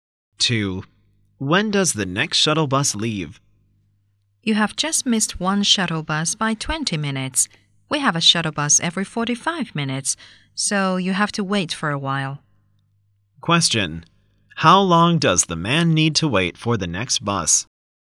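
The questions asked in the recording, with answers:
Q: How long does the man need to wait for the next bus?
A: 25 minutes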